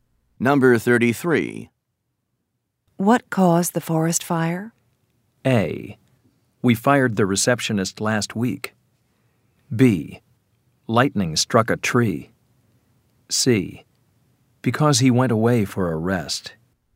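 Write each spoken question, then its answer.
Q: What caused the forest fire?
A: B: Lightning struck a tree.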